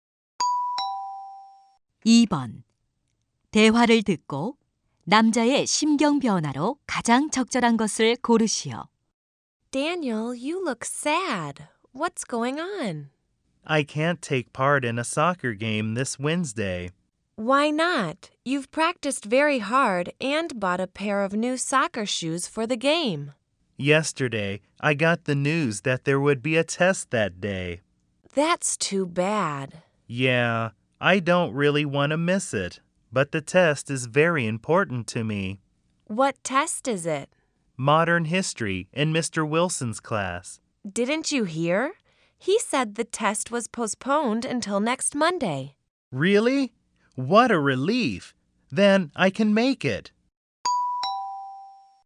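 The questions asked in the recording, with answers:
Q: 대화를 듣고 남자의 심경 변화로 가장 적절한 것을 고르시오.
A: 실망한 → 안도한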